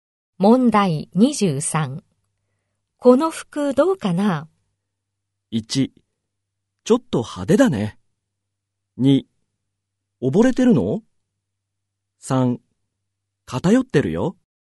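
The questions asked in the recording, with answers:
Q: この服どうかな?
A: 1: ちょっと派手だね。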